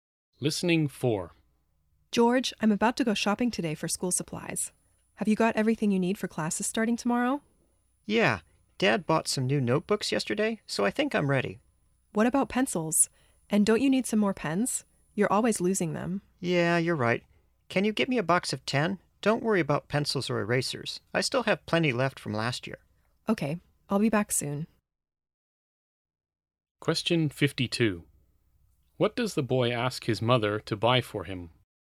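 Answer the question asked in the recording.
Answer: A box of 10 pens.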